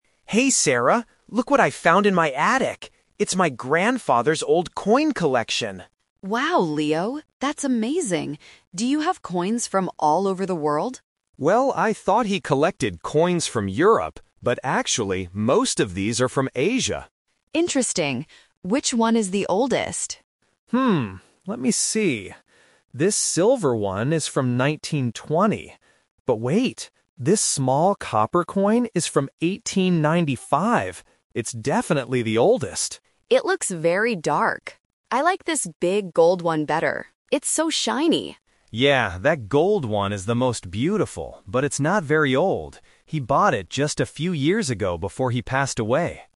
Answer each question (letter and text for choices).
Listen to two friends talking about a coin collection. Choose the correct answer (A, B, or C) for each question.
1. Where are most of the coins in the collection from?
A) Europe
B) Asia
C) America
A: B) Asia

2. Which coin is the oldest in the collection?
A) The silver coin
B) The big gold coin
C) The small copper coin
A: C) The small copper coin

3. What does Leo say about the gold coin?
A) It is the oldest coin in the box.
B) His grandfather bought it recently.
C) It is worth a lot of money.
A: B) His grandfather bought it recently.

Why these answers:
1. Leo clearly states, "...but actually, most of these are from Asia."
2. Leo says the small copper coin is from 1895 and confirms, "It's definitely the oldest."
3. Leo explains that the gold coin is not old because his grandfather "bought it just a few years ago."

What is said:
Leo: Hey Sarah, look what I found in my attic. It's my grandfather's old coin collection!
Sarah: Wow, Leo! That's amazing. Do you have coins from all over the world?
Leo: Well, I thought he collected coins from Europe, but actually, most of these are from Asia.
Sarah: Interesting. Which one is the oldest?
let me see. This silver one is from 1920. But wait, this small copper coin is from 1895! It's definitely the oldest.
Sarah: It looks very dark. I like this big gold one better. It's so shiny.
Leo: Yeah, that gold one is the most beautiful, but it's not very old. He bought it just a few years ago before he passed away.

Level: A2